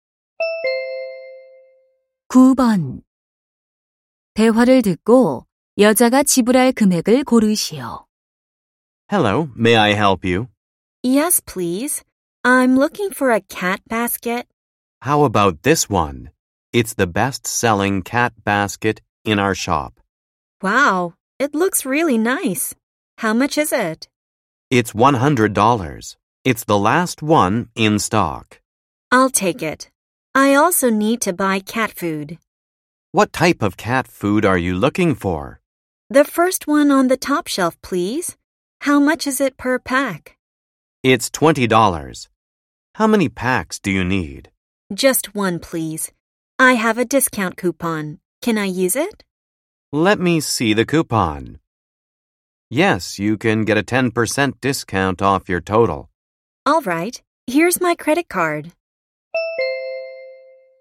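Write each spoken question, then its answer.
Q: 대화를 듣고 여자가 지불할 금액을 고르시오.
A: 108달러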